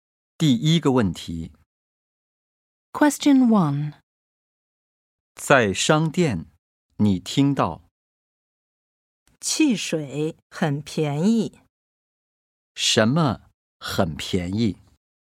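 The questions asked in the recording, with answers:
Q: 什么很便宜?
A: 汽水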